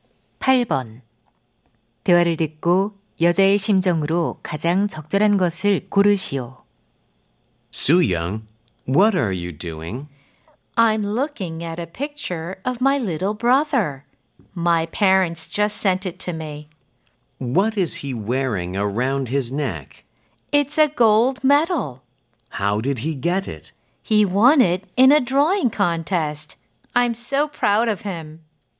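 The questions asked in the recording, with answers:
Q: 대화를 듣고 여자의 심정으로 가장 적절한 것을 고르시오.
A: 자랑스러움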